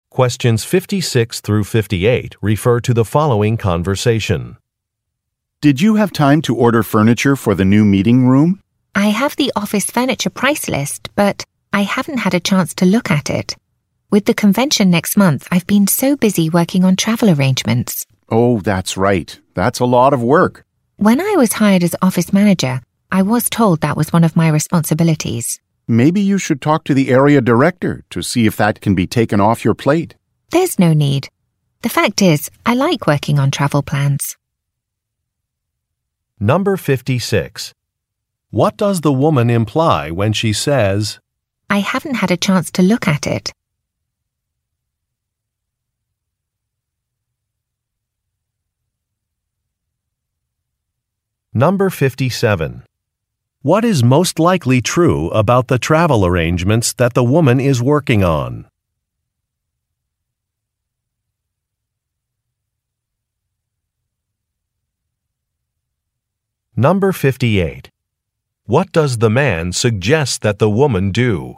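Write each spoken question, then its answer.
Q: What does the woman imply when she says, I haven't had a chance to look at it?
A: She has not ordered the furniture yet.

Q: What is most likely true about the travel arrangements that the woman is working on?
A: They are for a convention next month.

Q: What does the man suggest that the woman do?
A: Talk to the area director.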